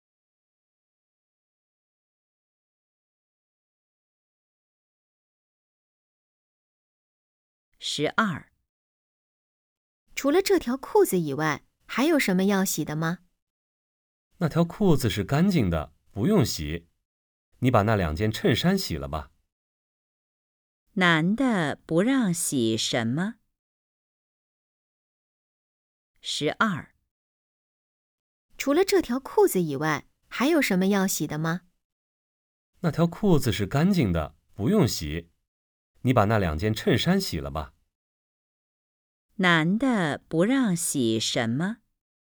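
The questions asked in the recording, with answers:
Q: 男的不让洗什么?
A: 那条裤子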